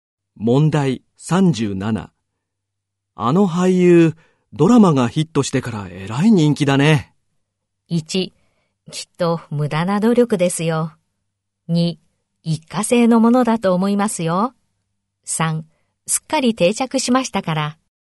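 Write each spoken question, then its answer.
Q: あの俳優、ドラマがヒットしてからえらい人気だね。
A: 2: 一過性のものだと思いますよ。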